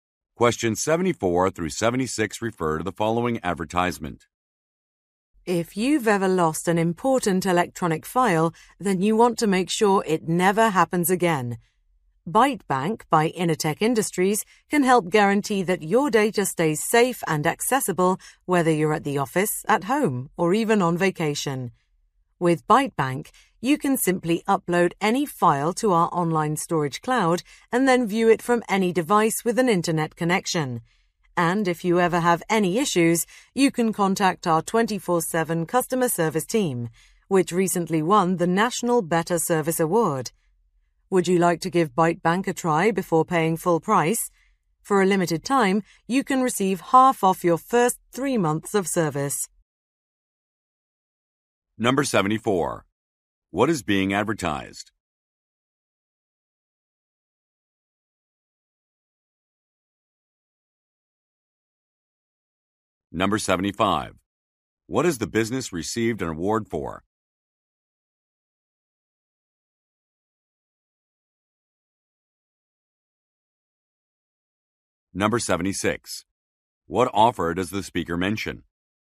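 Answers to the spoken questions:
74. An online file storage (cloud) service
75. Its customer service
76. Half off the first 3 months of service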